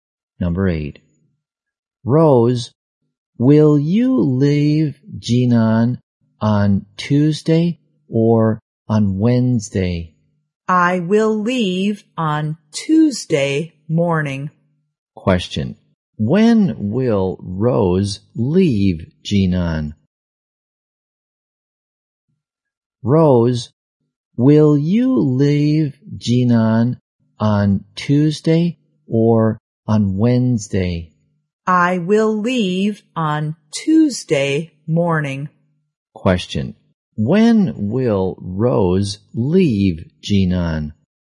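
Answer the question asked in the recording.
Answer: On Tuesday morning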